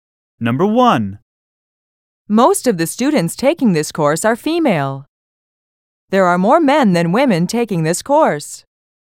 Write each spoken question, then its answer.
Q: There are more men than women taking this course.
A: Different is the correct answer.